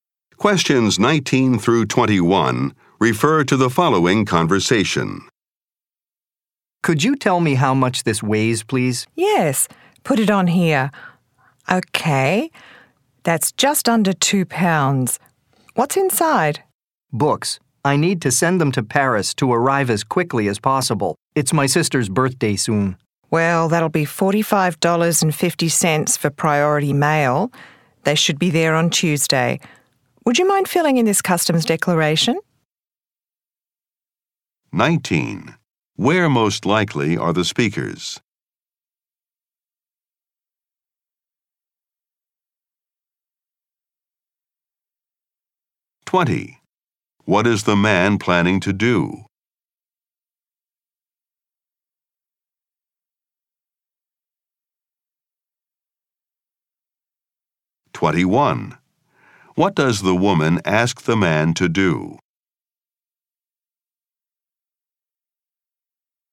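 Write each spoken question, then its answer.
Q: Where most likely are the speakers?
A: At a post office

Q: What is the man planning to do?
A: Send books to his sister in Paris for her birthday

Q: What does the woman ask the man to do?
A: Fill in a customs declaration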